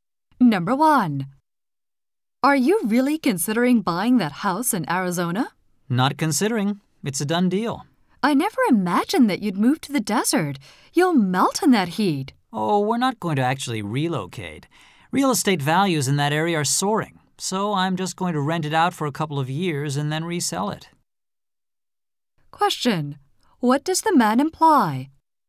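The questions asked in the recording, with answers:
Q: What does the man imply?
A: He bought the Arizona house as an investment to rent out and resell, not to live in.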